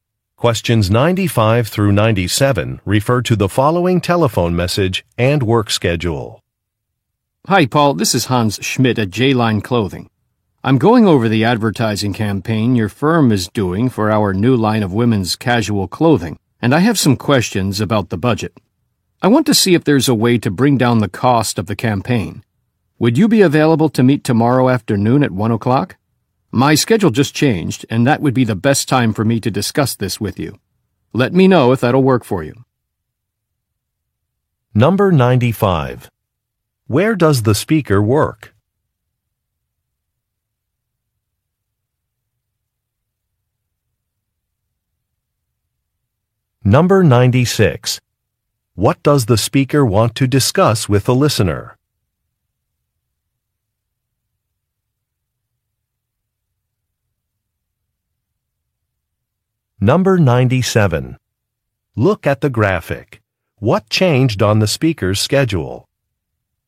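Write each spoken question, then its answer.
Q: Where does the speaker work?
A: At a clothing company (J-Line Clothing)

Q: What does the speaker want to discuss with the listener?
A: The budget for an advertising campaign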